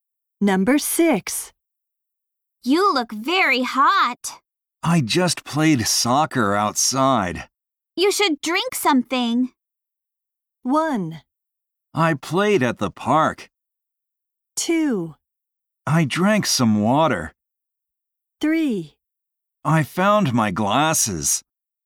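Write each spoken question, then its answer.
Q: You should drink something.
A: 2: I drank some water.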